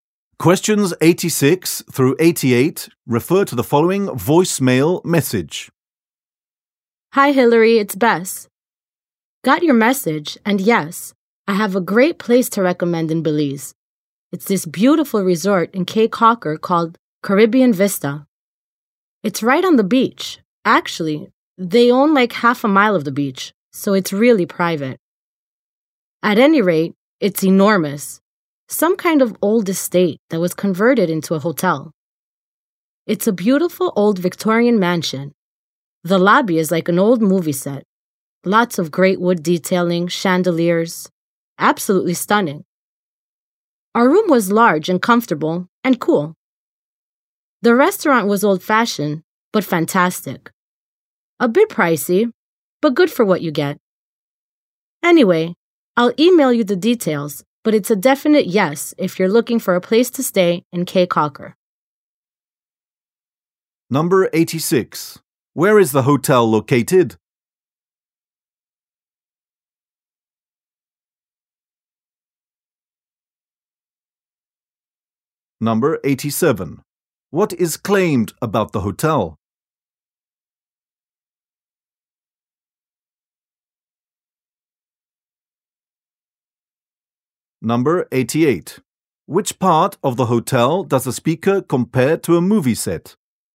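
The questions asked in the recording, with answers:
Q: Where is the hotel located?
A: On the beach in Cay Caulker, Belize

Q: Which part of the hotel does the speaker compare to a movie set?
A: The lobby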